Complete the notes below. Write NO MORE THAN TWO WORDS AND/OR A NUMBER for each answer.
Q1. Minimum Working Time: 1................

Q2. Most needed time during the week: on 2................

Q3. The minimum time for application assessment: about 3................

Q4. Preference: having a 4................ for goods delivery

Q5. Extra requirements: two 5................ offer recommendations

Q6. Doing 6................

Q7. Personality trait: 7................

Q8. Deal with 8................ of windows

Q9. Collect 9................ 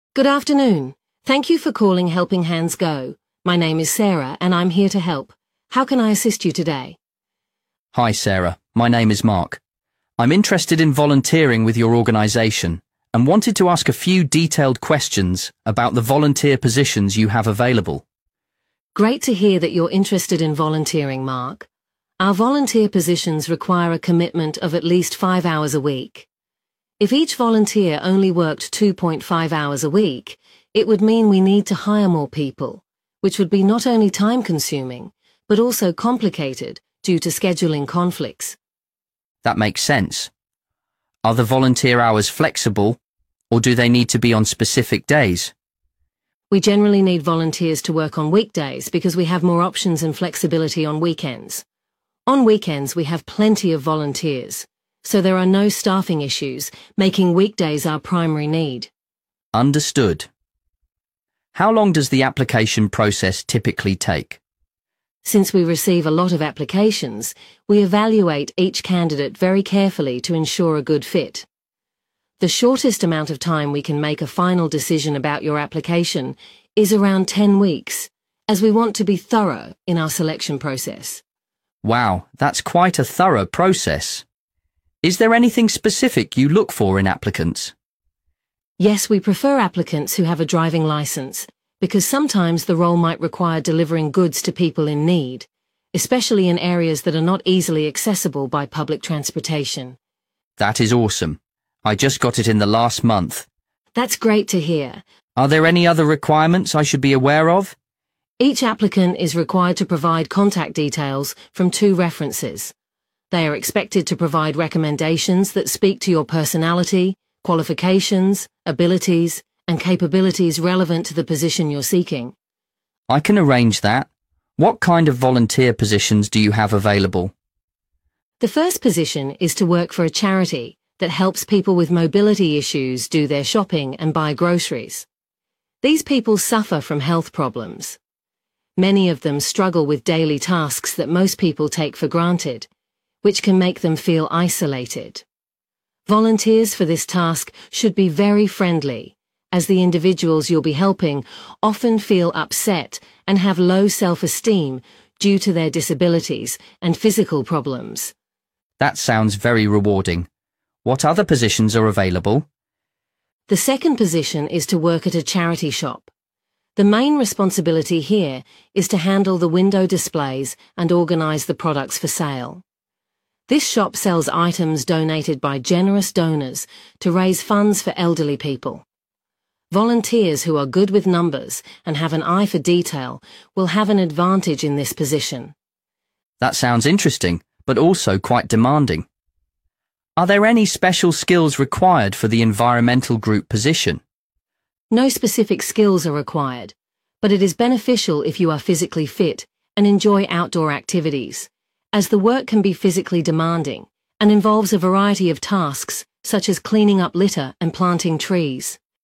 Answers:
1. 5 Hours
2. Weekdays
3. 10 Weeks
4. Driving License
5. References
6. Shopping
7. Friendly
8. Displays
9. Litter